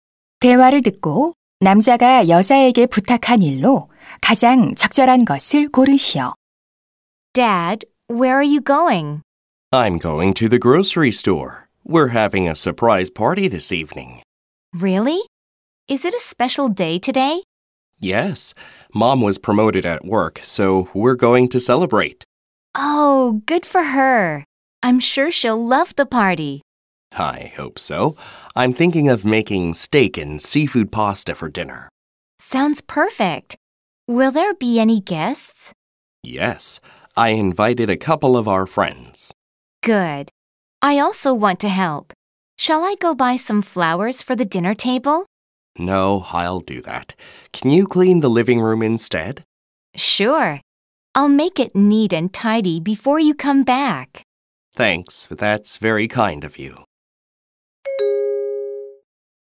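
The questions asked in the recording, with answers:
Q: 대화를 듣고 남자가 여자에게 부탁한 일로 가장 적절한 것을 고르시오.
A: 거실 청소하기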